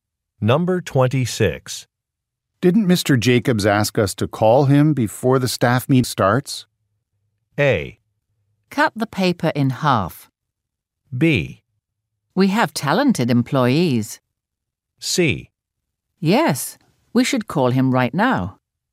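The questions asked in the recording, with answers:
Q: Didn't Mr. Jacobs ask us to call him before the staff meet starts?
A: C: Yes, we should call him right now.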